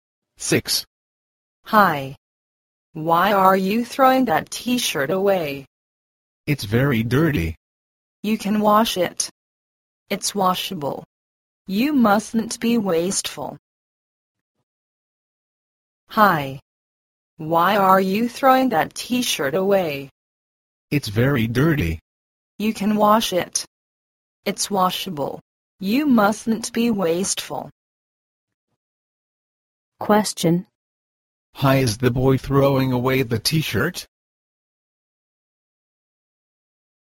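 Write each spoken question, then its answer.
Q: Hi, is the boy throwing away the T-shirt?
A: Because it's very dirty.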